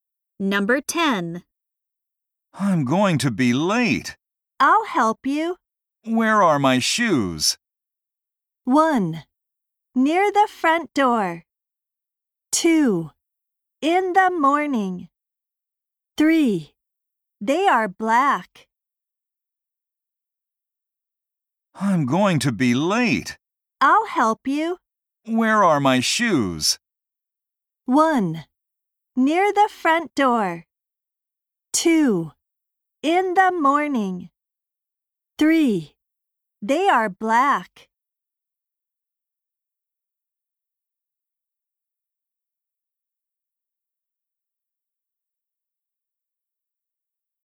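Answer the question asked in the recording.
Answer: 1: Near the front door.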